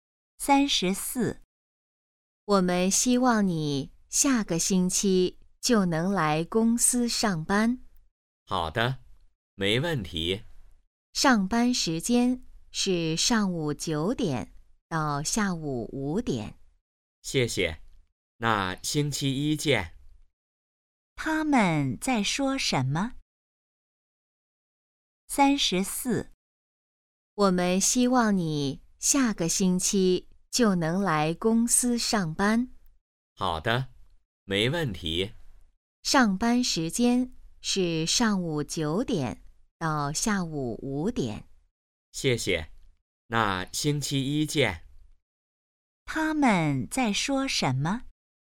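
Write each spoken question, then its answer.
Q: 他们在说什么?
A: 去公司上班的事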